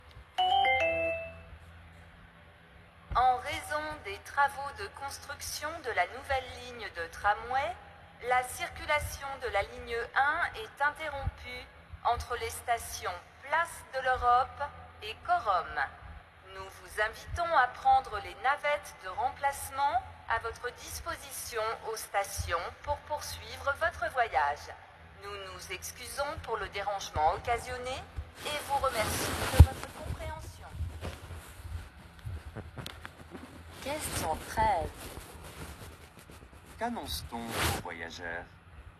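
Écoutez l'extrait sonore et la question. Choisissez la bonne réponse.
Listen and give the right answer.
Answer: La ligne 1 est interrompue à cause de travaux; des navettes de remplacement sont proposées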